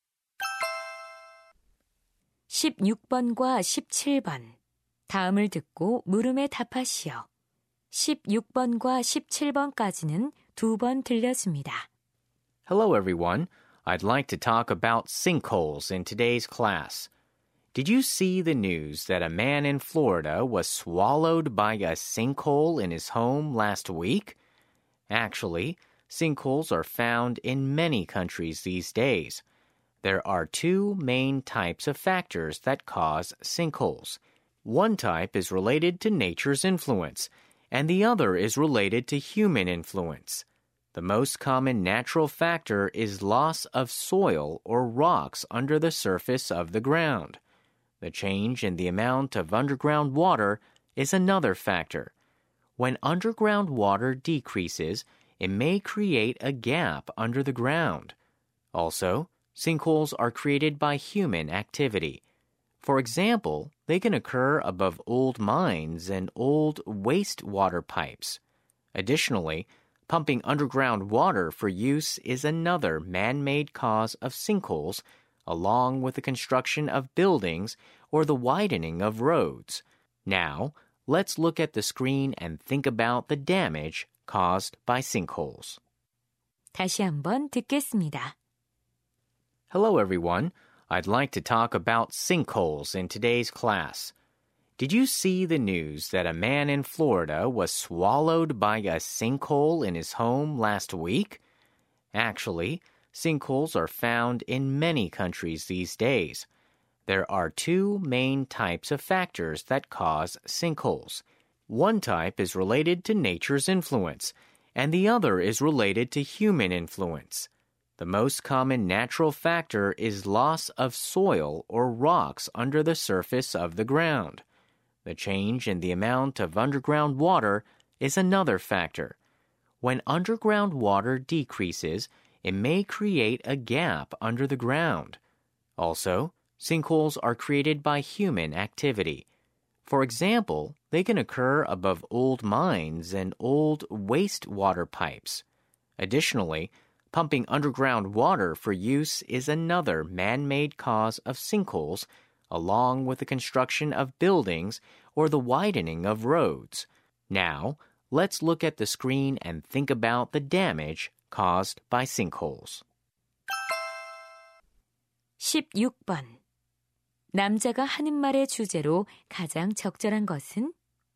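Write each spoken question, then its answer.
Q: 16번 남자가 하는 말의 주제로 가장 적절한 것은?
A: 싱크홀이 생기는 원인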